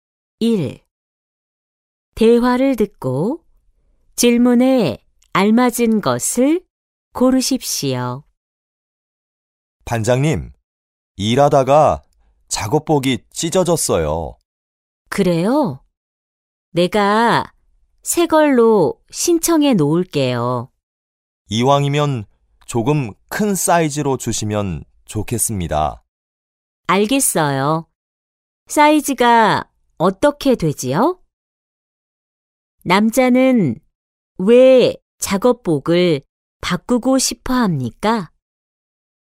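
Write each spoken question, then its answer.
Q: 남자는 왜 작업복을 바꾸고 싶어 합니까?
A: 일하다가 작업복이 찢어져서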